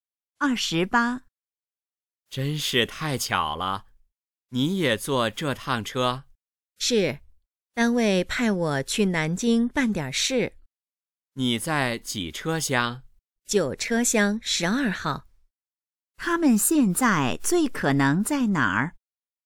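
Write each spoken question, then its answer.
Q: 他们现在最可能在哪儿?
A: 火车上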